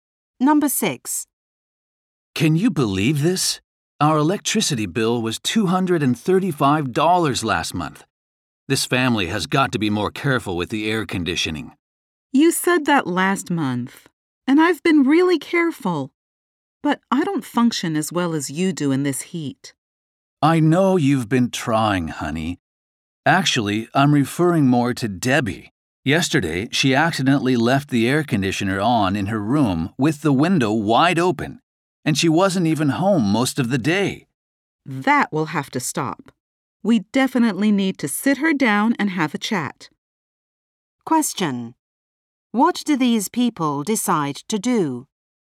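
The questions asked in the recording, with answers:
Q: What do these people decide to do?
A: Talk to Debbie about the air conditioning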